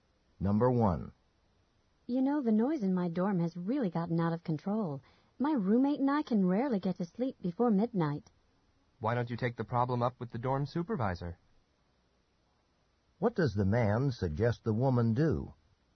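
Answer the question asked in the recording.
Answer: Talk to the dorm supervisor about the noise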